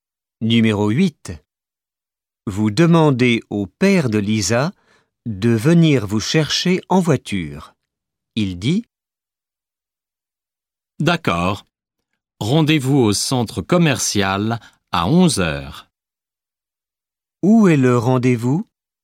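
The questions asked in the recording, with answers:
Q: Où est le rendez-vous ?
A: Au centre commercial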